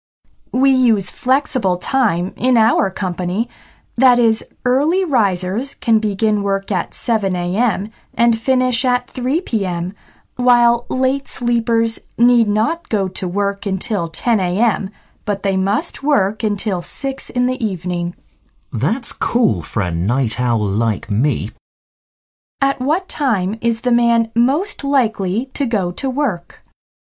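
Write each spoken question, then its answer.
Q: At what time is the man most likely to go to work?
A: 10 a.m.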